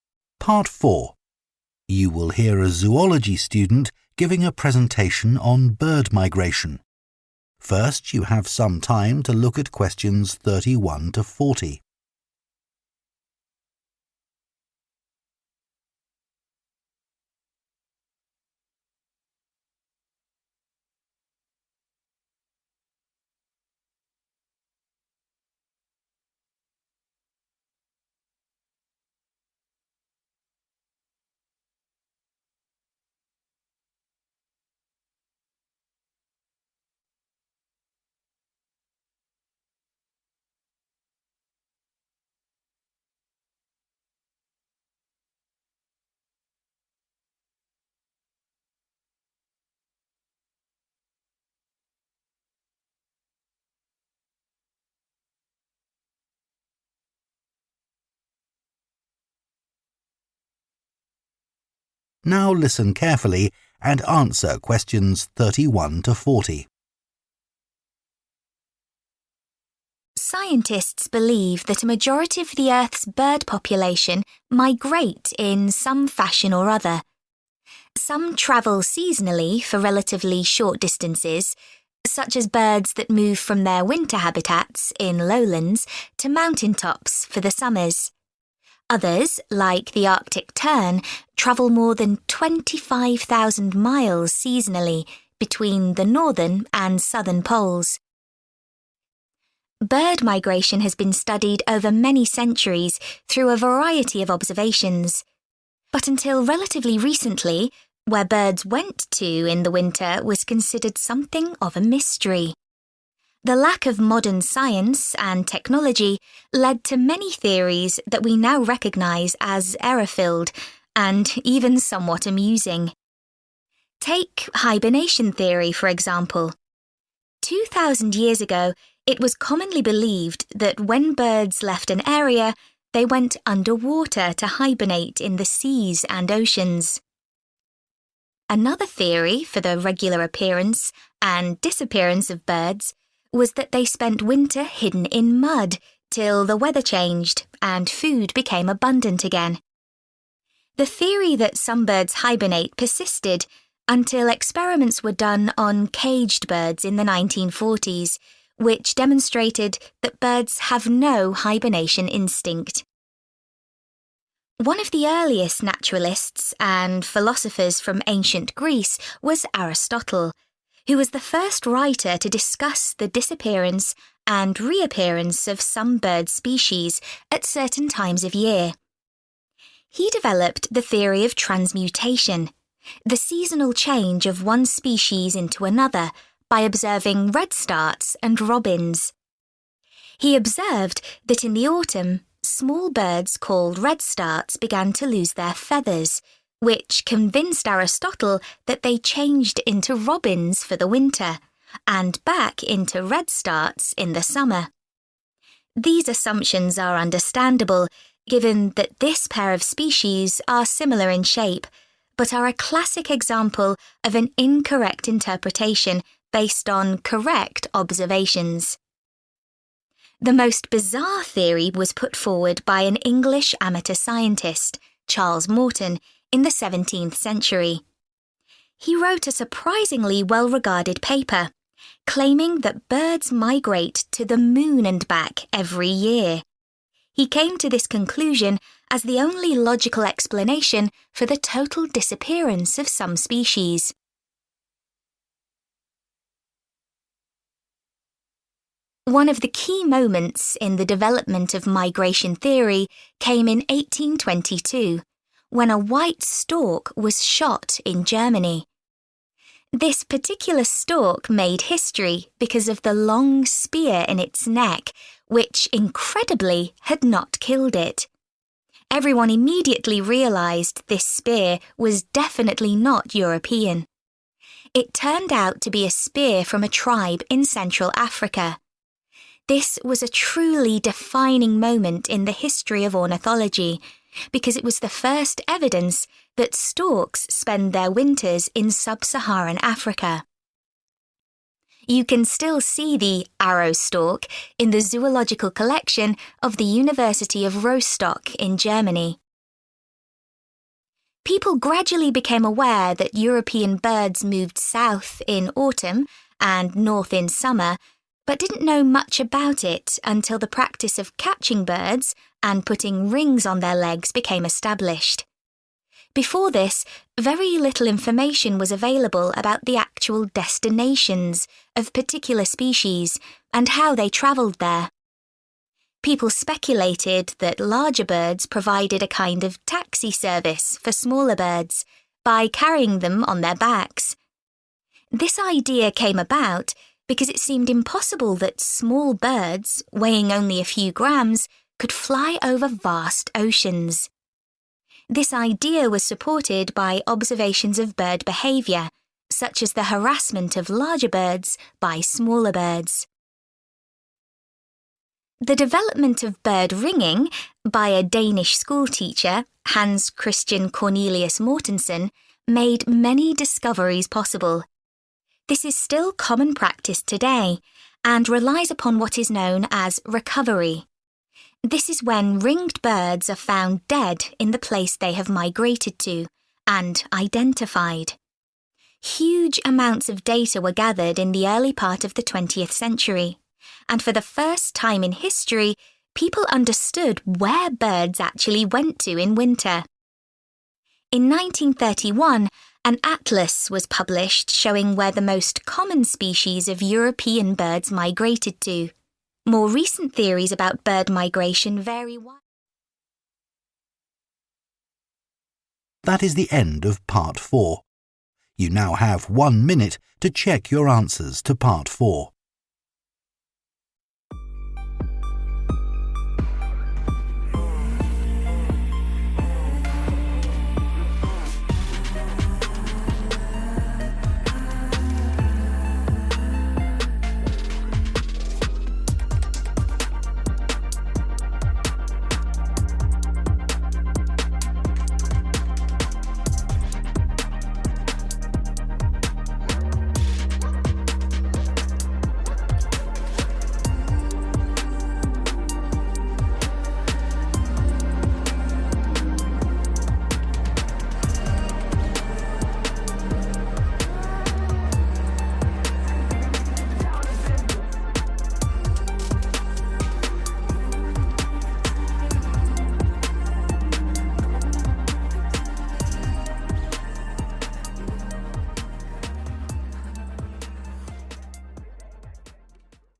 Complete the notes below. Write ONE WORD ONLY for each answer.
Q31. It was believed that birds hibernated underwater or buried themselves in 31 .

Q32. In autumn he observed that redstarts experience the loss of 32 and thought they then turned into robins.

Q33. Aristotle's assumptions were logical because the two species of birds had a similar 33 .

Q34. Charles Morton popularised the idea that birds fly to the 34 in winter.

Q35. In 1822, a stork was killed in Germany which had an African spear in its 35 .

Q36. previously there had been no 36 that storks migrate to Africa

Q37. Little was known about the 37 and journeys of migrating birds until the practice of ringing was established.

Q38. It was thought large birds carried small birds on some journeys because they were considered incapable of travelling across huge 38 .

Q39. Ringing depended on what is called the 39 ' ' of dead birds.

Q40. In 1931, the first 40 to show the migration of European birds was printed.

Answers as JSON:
{"31": "mud", "32": "feathers", "33": "shape", "34": "moon", "35": "neck", "36": "evidence", "37": "destinations", "38": "oceans", "39": "recovery", "40": "atlas"}